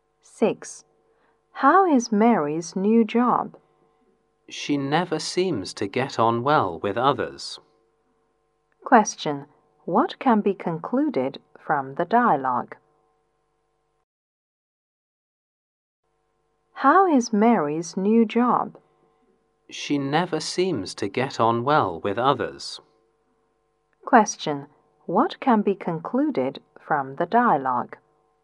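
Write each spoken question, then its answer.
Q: What can be concluded from the dialogue?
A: Mary doesn't get on well with others in her new job.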